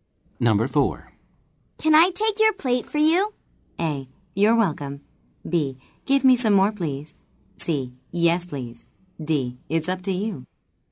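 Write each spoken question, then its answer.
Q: Can I take your plate for you?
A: C: Yes, please.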